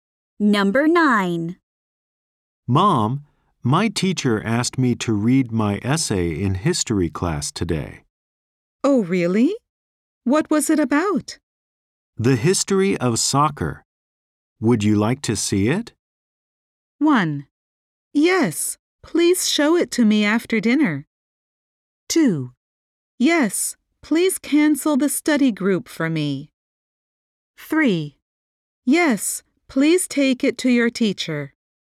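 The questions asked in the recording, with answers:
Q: The history of soccer. Would you like to see it?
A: 1: Yes, please show it to me after dinner.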